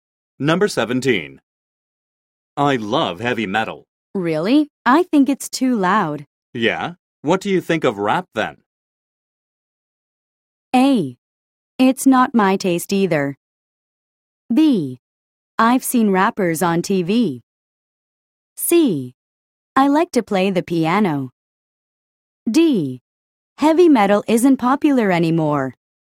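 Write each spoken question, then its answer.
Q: Yeah? What do you think of rap then?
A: A: It's not my taste either.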